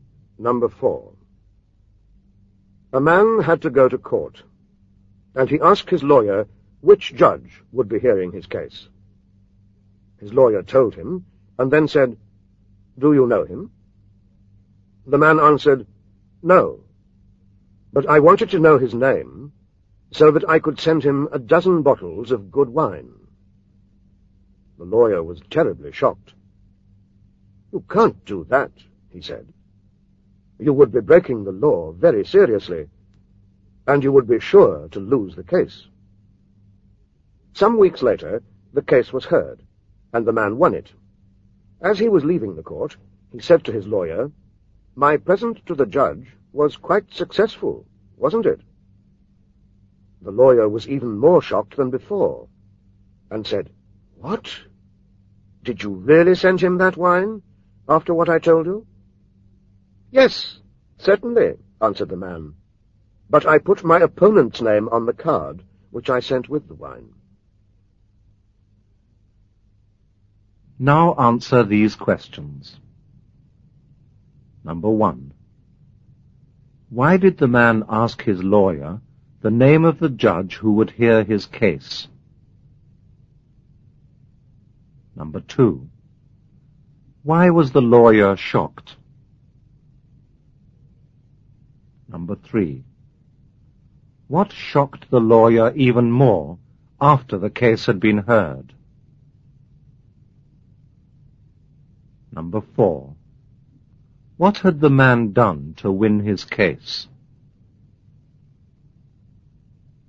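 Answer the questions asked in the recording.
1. Because he wanted to send the judge a dozen bottles of good wine.
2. Because sending the judge wine would be seriously breaking the law and would lose him the case.
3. The man said he had really sent the wine to the judge.
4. He sent the wine with his opponent's name on the card.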